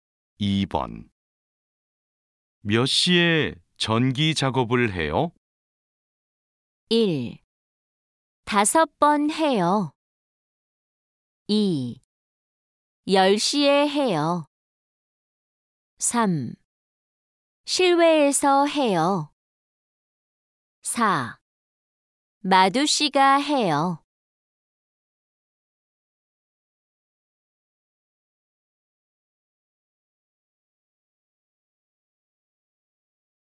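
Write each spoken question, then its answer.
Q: 몇 시에 전기 작업을 해요?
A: 2: 10시에 해요.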